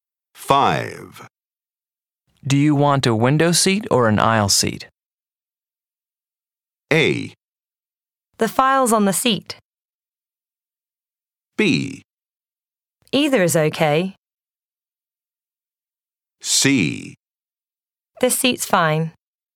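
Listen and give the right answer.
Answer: B: Either is okay.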